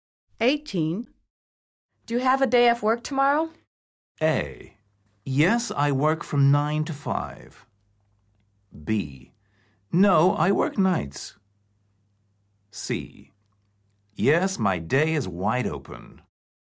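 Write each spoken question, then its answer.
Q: Do you have a day off work tomorrow?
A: C: Yes, my day is wide open.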